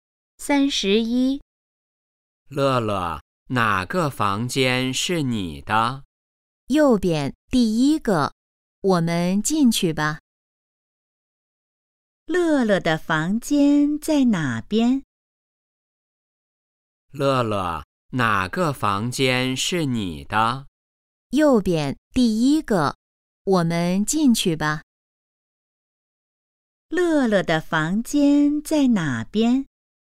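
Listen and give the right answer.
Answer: 右边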